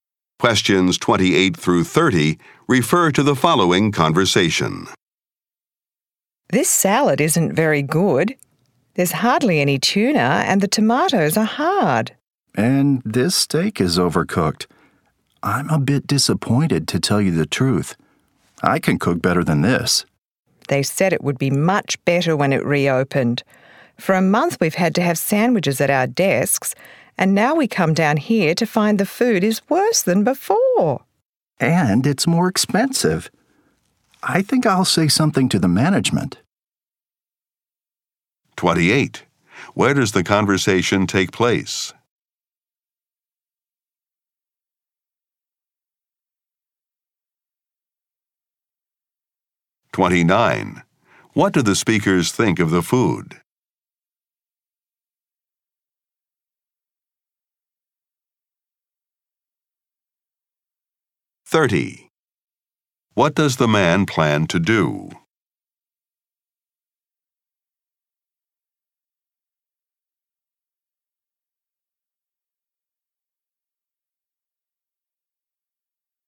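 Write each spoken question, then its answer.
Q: Where does the conversation take place?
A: In the company cafeteria

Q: What do the speakers think of the food?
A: It is disappointing, worse than before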